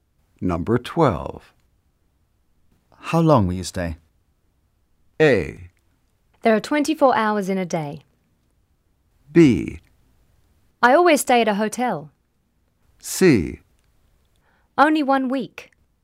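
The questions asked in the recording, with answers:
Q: How long will you stay?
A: C: Only 1 week.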